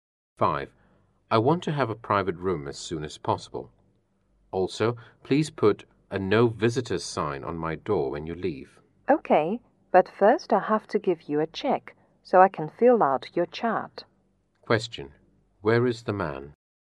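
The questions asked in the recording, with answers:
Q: Where is the man?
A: In a hospital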